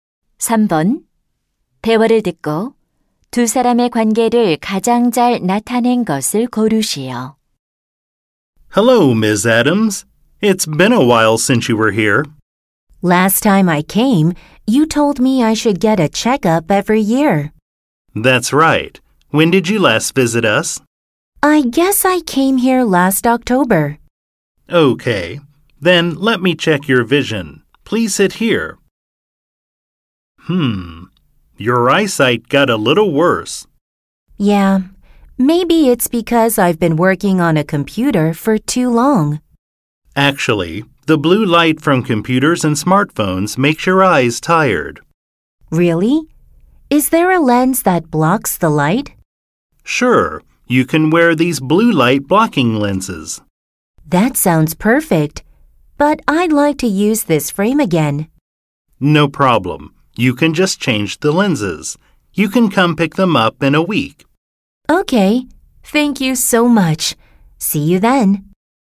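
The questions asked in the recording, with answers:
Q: 대화를 듣고 두 사람의 관계를 가장 잘 나타낸 것을 고르시오.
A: 안경사 - 손님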